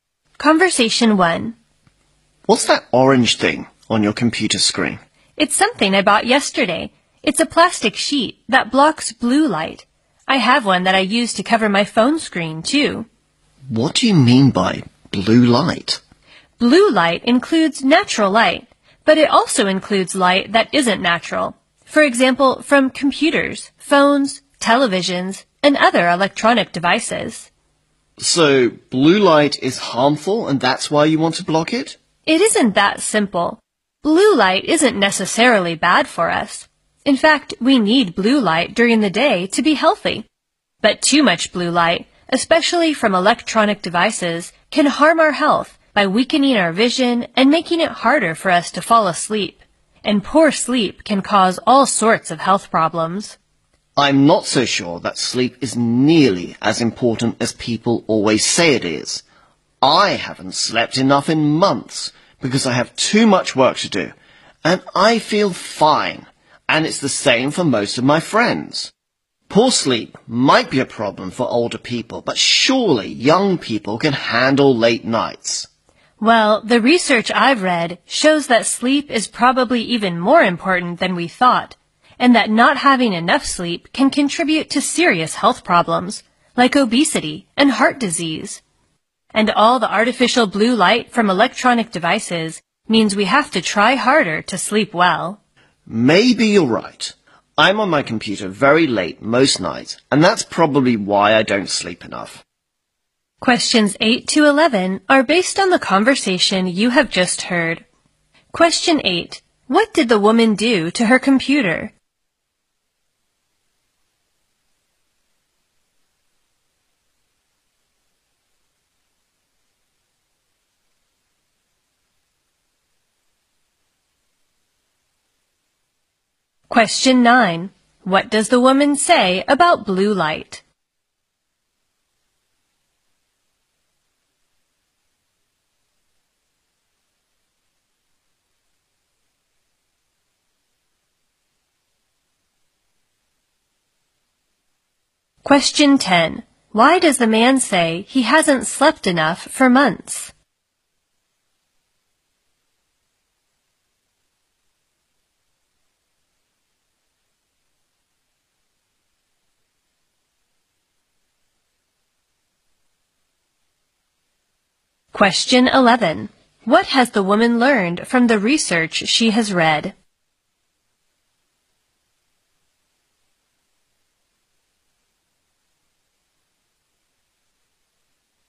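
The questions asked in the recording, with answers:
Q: What did the woman do to her computer?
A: She put a plastic sheet over the screen to block blue light.

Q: What does the woman say about blue light?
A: It isn't necessarily bad; we need it during the day, but too much harms health.

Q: Why does the man say he hasn't slept enough for months?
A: He has too much work to do.

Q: What has the woman learned from the research she has read?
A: Sleep is even more important than we thought.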